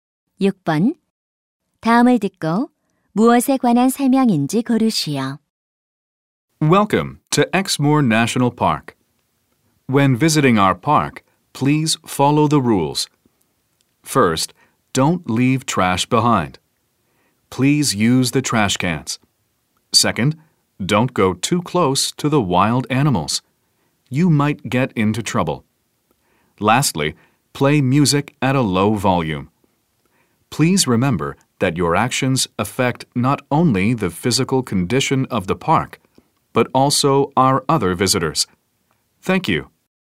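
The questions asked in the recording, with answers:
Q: 다음을 듣고 무엇에 관한 설명인지 고르시오.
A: 국립공원 이용 규칙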